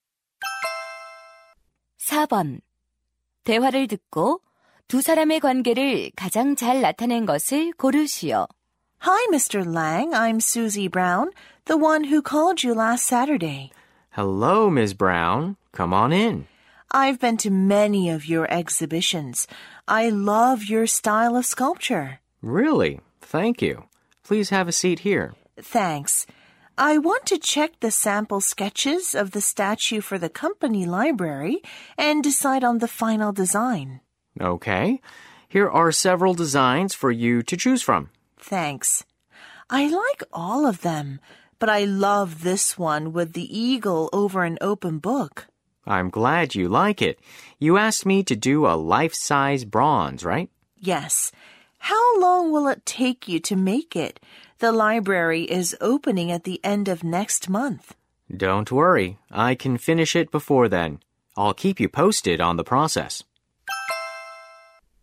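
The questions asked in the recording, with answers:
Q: 대화를 듣고 두 사람의 관계를 가장 잘 나타낸 것을 고르시오.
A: 조각가와 의뢰인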